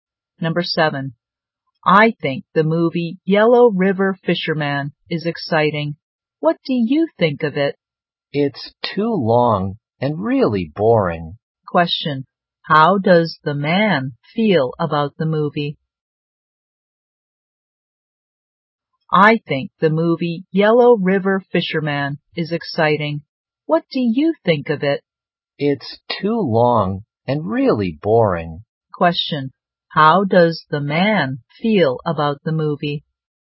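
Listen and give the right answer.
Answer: Boring (too long)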